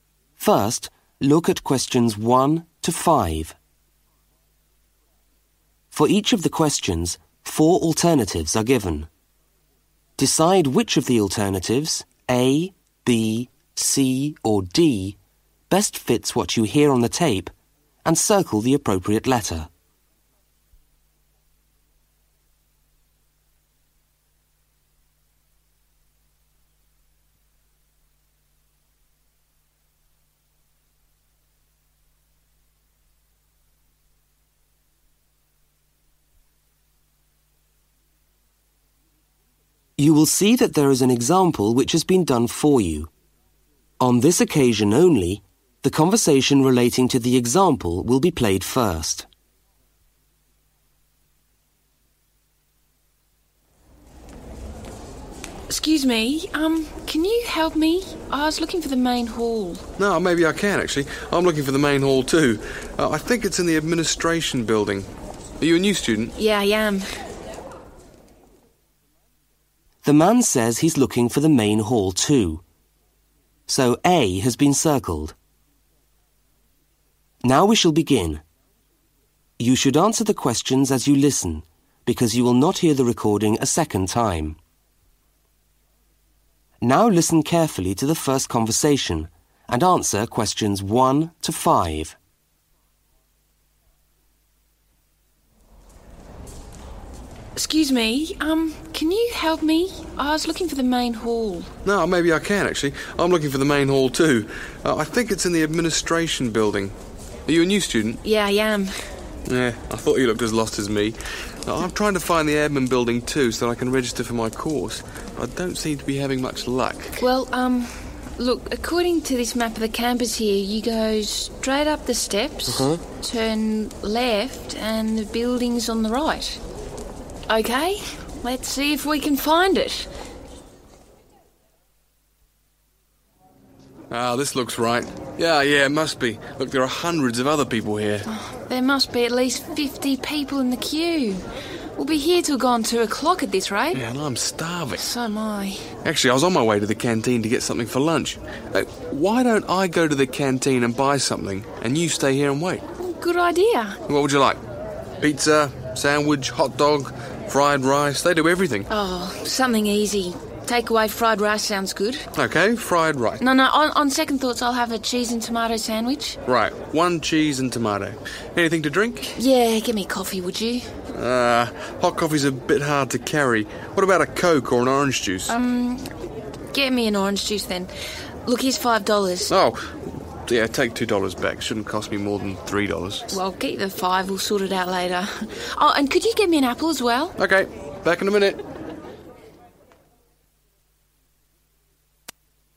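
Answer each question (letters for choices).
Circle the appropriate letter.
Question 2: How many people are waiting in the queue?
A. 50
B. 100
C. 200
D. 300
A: A

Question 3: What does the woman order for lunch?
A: a cheese and tomato sandwich

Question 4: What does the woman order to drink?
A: an orange juice

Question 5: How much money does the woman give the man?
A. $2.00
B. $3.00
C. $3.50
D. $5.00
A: D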